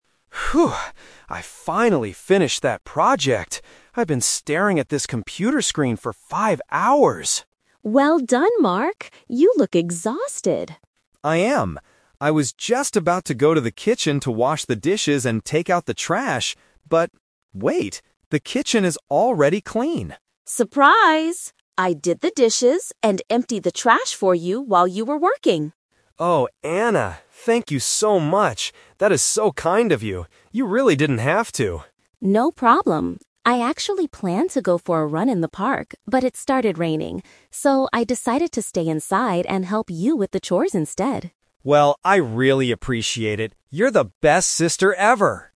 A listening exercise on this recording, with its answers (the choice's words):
Listen to the conversation and choose the correct answer (A, B, or C).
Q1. What has Mark been doing for the last five hours?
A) Washing the dishes.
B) Working on his computer.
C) Taking out the trash.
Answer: Working on his computer.

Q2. Which chores did Anna finish?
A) Washing the dishes and taking out the trash.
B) Cleaning the living room and the kitchen.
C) Doing the laundry and going for a run.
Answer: Washing the dishes and taking out the trash.

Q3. Why did Anna decide to help Mark?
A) Because she was bored.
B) Because Mark asked her for help.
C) Because she couldn't go for a run due to the weather.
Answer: Because she couldn't go for a run due to the weather.

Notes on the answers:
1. Mark says, "I've been staring at this computer screen for five hours!" Trap: Options (A) and (C) are things he planned to do after finishing work, but he hasn't done them yet.
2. Anna says, "I did the dishes and emptied the trash for you." Trap: Option (C) mentions "going for a run", but that was her original plan that she didn't do.
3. Anna explains the "Twist": she wanted to go for a run, "but it started raining," so she stayed to help. Trap: Option (B) is wrong because Mark was surprised; he didn't ask her.

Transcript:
I finally finished that project. I've been staring at this computer screen for five hours!
Anna: Well done, Mark! You look exhausted.
Mark: I am. I was just about to go to the kitchen to wash the dishes and take out the trash, but... wait, the kitchen is already clean!
Anna: Surprise! I did the dishes and emptied the trash for you while you were working.
Mark: Oh, Anna! Thank you so much! That is so kind of you. You really didn't have to.
Anna: No problem. I actually planned to go for a run in the park, but it started raining. So, I decided to stay inside and help you with the chores instead.